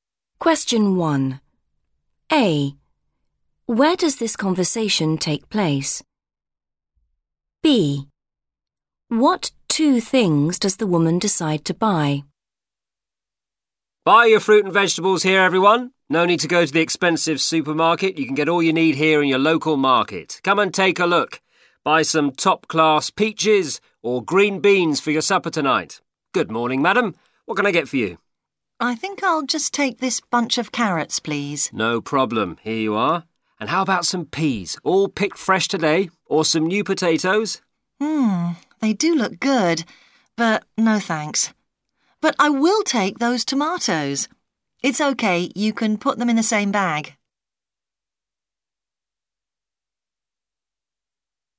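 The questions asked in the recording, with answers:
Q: Where does this conversation take place?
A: a (local) market

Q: What two things does the woman decide to buy?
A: carrots and tomatoes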